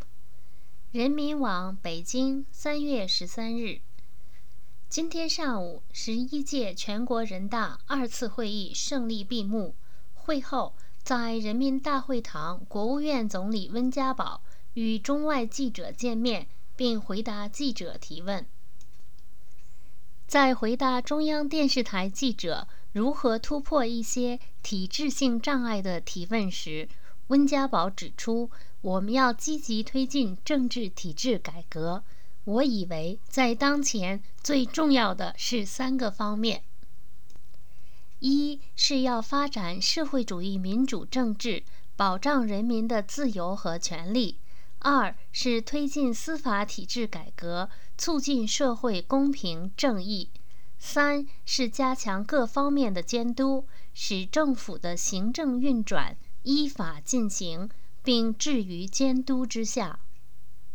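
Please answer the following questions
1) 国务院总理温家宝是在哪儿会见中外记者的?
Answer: 在人民大会堂

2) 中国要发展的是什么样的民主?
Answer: 社会主义民主政治

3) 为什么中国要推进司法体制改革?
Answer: 为了促进社会公平正义

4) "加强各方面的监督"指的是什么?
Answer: 使政府的行政运转依法进行,并置于监督之下

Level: M.Phil Year 2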